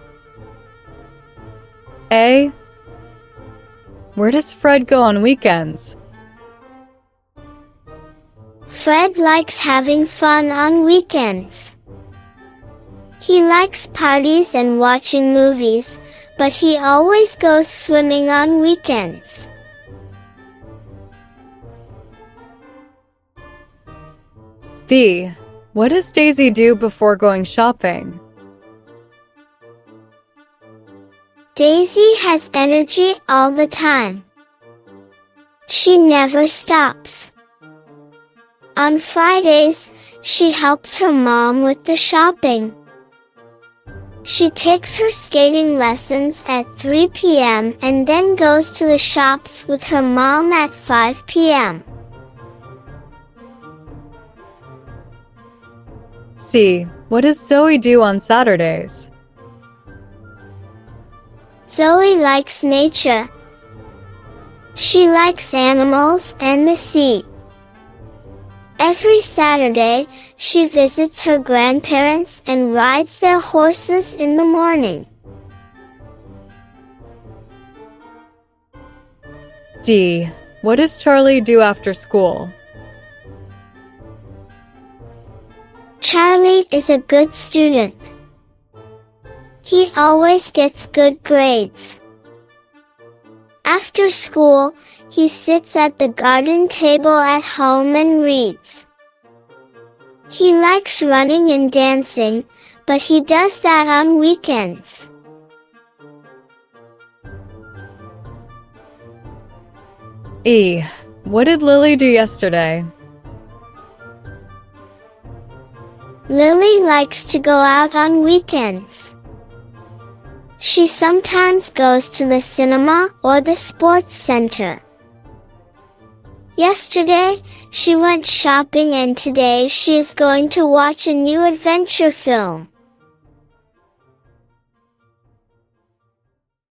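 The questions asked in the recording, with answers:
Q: Where does Fred go on weekends?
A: swimming

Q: What does Daisy do before going shopping?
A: she takes skating lessons

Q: What does Zoe do on Saturdays?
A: visits her grandparents and rides horses

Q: What does Charlie do after school?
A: reads at the garden table

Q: What did Lily do yesterday?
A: went shopping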